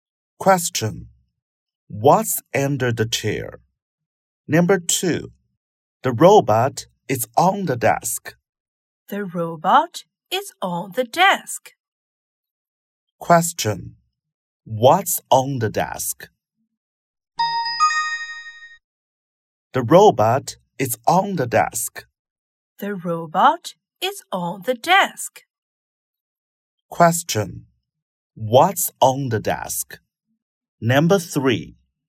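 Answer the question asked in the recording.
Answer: The robot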